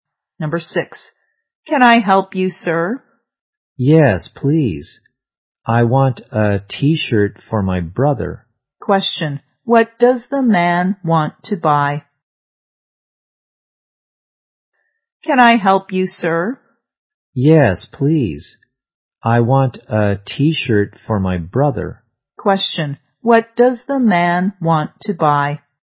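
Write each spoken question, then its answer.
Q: Question, what does the man want to buy?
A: A T-shirt for his brother.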